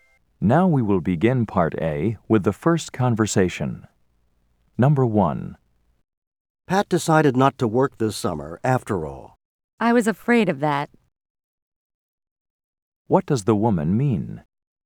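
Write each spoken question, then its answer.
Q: What does the woman mean?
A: She expected that Pat wouldn't work this summer.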